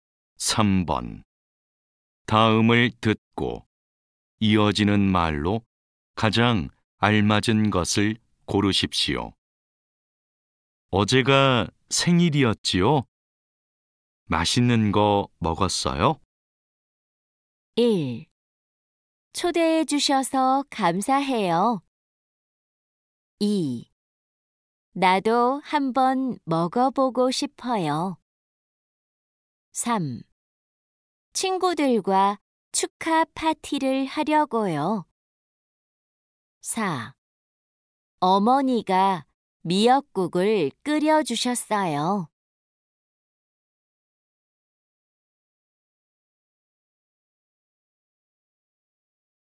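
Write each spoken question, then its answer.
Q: 어제가 생일이었지요? 맛있는 거 먹었어요?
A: 4: 어머니가 미역국을 끓여주셨어요.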